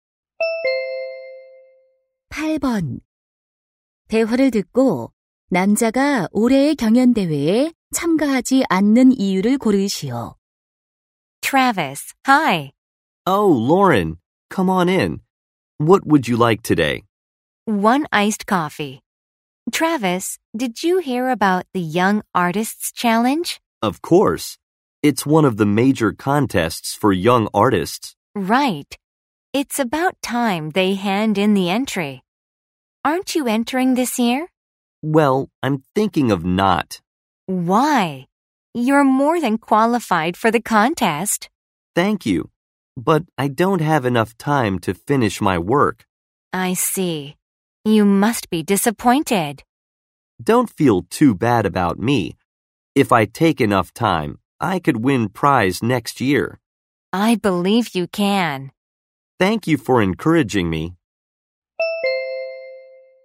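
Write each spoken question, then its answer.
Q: 대화를 듣고 남자가 올해의 경연 대회에 참가하지 않는 이유를 고르시오.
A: 작품을 완성할 시간이 부족해서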